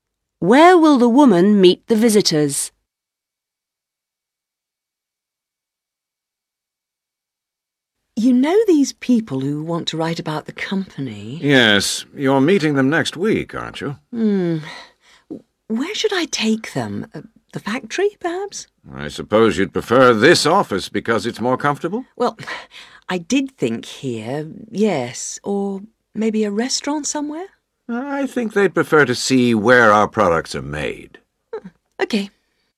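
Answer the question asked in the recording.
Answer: At the factory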